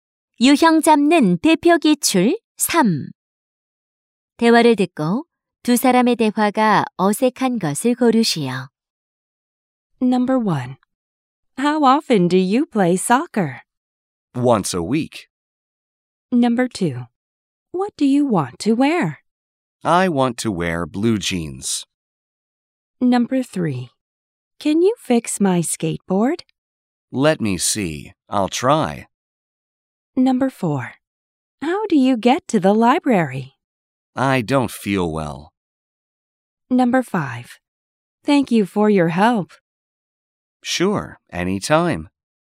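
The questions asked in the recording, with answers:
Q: 대화를 듣고 두 사람의 대화가 어색한 것을 고르시오.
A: 4번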